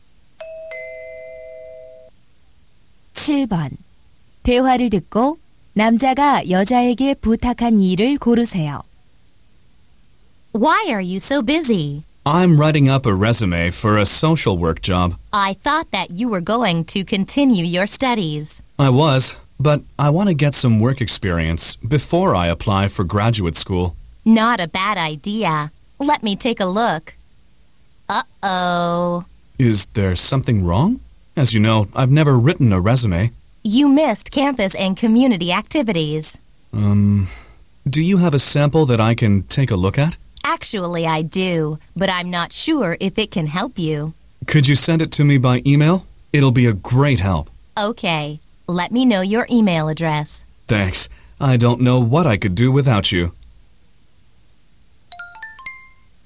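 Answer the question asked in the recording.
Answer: 이력서 견본을 이메일로 보내 주기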